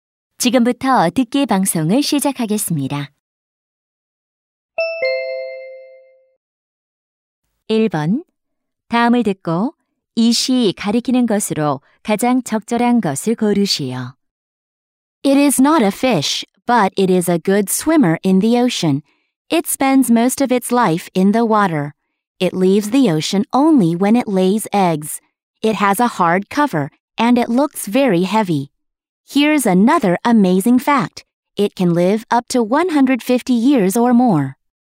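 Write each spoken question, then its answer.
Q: 다음을 듣고 이 시 가리키는 것으로 가장 적절한 것을 고르시오.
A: 바다거북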